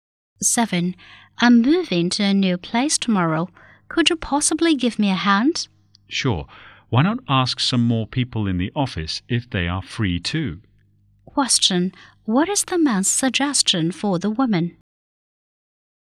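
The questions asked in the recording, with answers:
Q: What is the man's suggestion for the woman?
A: Ask more people in the office to help her move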